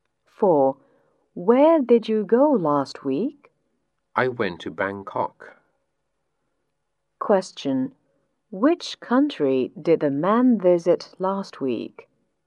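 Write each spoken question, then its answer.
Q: Which country did the man visit last week?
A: Thailand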